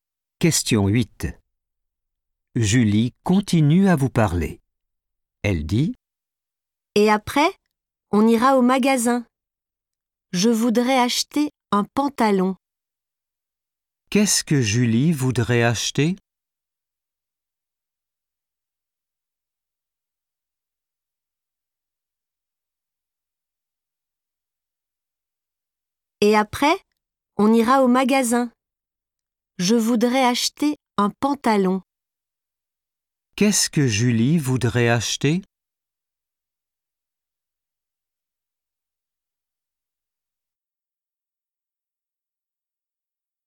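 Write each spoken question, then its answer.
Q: Qu'est-ce que Julie voudrait acheter?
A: un pantalon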